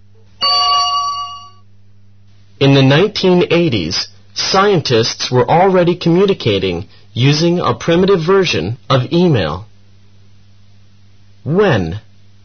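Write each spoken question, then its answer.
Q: When?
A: In the 1980s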